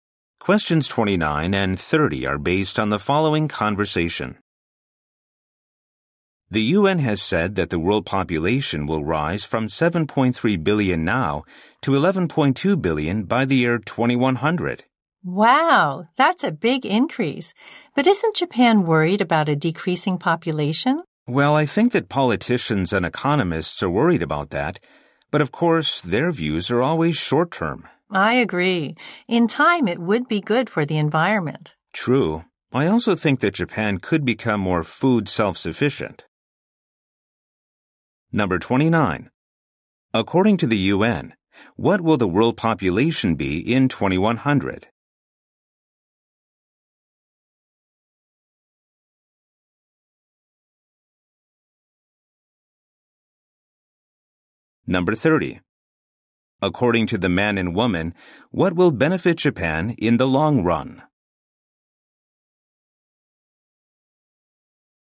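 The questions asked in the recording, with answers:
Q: According to the UN, what will the world population be in 2100?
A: 11.2 billion

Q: According to the man and woman, what will benefit Japan in the long run?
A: A decreasing population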